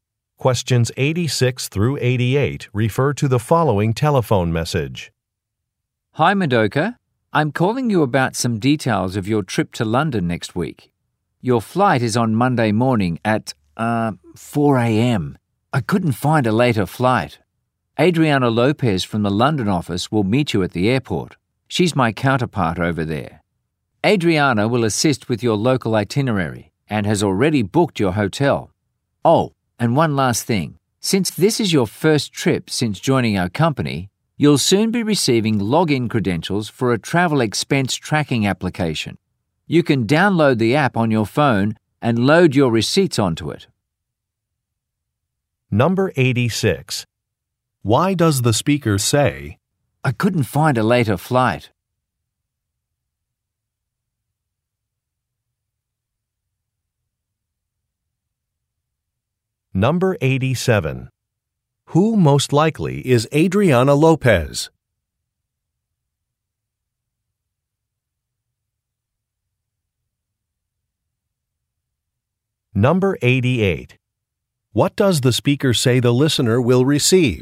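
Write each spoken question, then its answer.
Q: Who most likely is Adriana Lopez?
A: The speaker's counterpart at the London office

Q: What does the speaker say the listener will receive?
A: Login credentials for a travel expense tracking app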